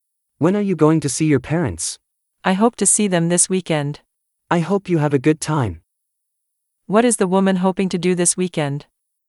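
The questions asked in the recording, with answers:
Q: What is the woman hoping to do this weekend?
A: see her parents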